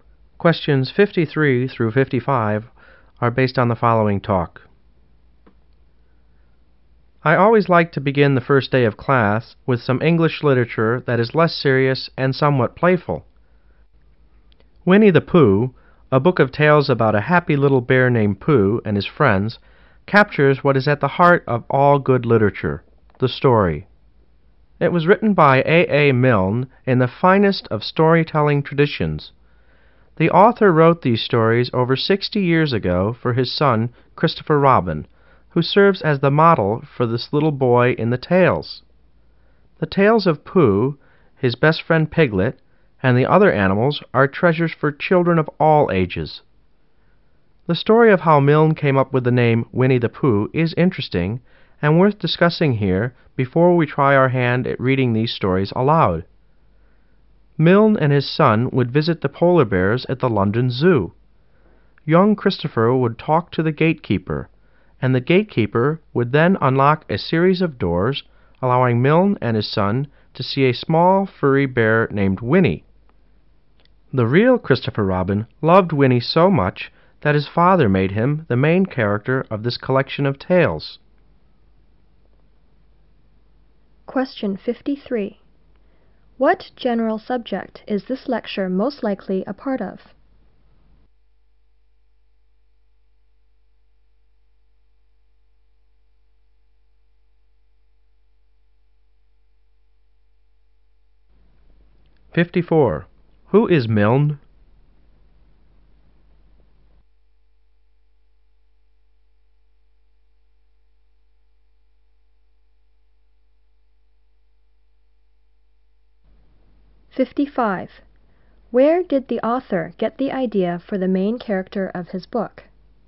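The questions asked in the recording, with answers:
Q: What general subject is this lecture most likely a part of?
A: English literature

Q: Who is Milne?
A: The author of Winnie the Pooh

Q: Where did the author get the idea for the main character of his book?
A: From a bear named Winnie at the London Zoo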